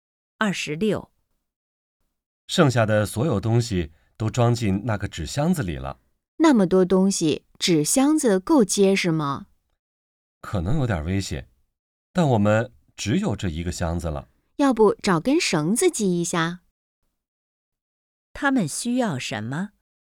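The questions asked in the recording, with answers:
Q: 他们需要什么?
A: 绳子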